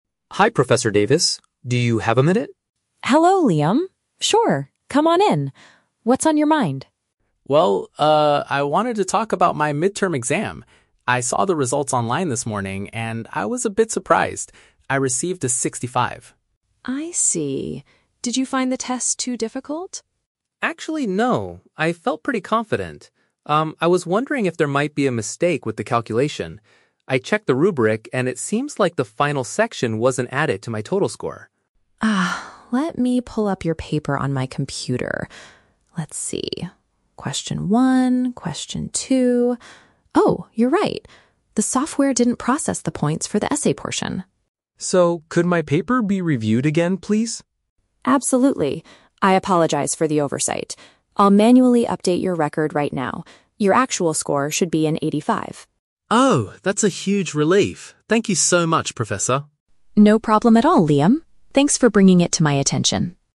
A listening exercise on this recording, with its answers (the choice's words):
Listen to a conversation between a student and a professor, and choose the correct answer (A, B, or C) for each question.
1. Why did the student go to see the professor?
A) To complain that the midterm was too hard.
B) To ask about a possible error in his test marks.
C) To request more time to finish his essay.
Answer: To ask about a possible error in his test marks.

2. How did the student feel when he first saw his grade online?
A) He was quite shocked.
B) He felt very relieved.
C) He was extremely angry.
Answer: He was quite shocked.

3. Why was the student's initial score so low?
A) He forgot to answer the final question on the test.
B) The professor gave him a bad grade for his writing.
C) The points for one part of the exam were missing.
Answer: The points for one part of the exam were missing.

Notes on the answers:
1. The student states that he thinks there is "a mistake with the calculation" regarding his exam. "Error in his test marks" is a synonym for this phrase. Trap Analysis: Option (A) is a trap. The professor asks if he found the test "too difficult" (hard), but the student says "Actually, no." Option (C) is plausible in a university setting but is never mentioned in the conversation.
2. The student says, "I was a bit surprised" when he saw his result. "Shocked" is a synonym for surprised. Trap Analysis: Option (B) is a trap. He says "that's a huge relief" at the very end of the conversation after his grade is fixed, not when he first saw it. Option (C) is incorrect because he is very polite and never expresses anger.
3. The student suspects that "the final section wasn't added," and the professor confirms that the system "didn't process the points for the essay portion." Trap Analysis: Option (B) is a trap. The "essay" is mentioned, but he didn't get a bad grade on it; the software just failed to count the points. Option (A) is plausible but incorrect because he completed the whole test.

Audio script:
Student: "Hi Professor Davis, do you have a minute?"
Professor: "Hello Liam. Sure, come on in. What's on your mind?"
Student: "Well, uh, I wanted to talk about my midterm exam. I saw the results online this morning, and I was a bit surprised. I received a 65."
Professor: "I see. Did you find the test too difficult?"
Student: "Actually, no. I felt pretty confident. Um, I was wondering if there might be a mistake with the calculation. I checked the rubric, and it seems like the final section wasn't added to my total score."
Professor: "Ah, let me pull up your paper on my computer. Let's see... Oh, you're right. The software didn't process the points for the essay portion."
Student: "So, could my paper be reviewed again, please?"
Professor: "Absolutely. I apologize for the oversight. I'll manually update your record right now. Your actual score should be an 85."
Student: "Oh, that's a huge relief! Thank you so much, Professor."
Professor: "No problem at all, Liam. Thanks for bringing it to my attention."